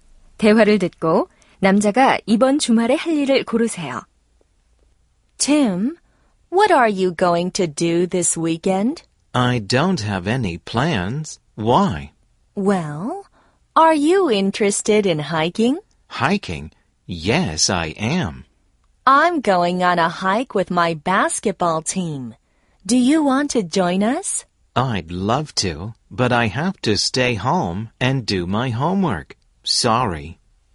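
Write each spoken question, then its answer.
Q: 대화를 듣고 남자가 이번 주말에 할 일을 고르세요.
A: 집에서 숙제하기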